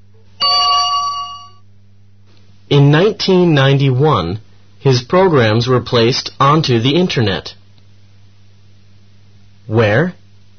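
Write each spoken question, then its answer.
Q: Where?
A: onto the Internet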